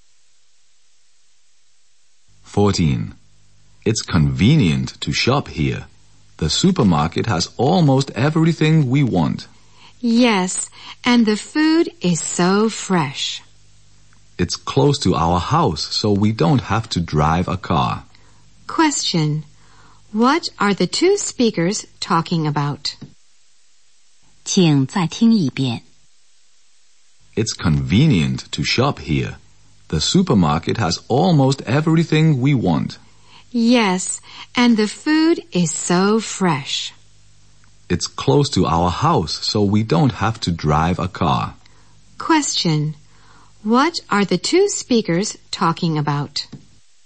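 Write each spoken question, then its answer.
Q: What are the two speakers talking about?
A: The supermarket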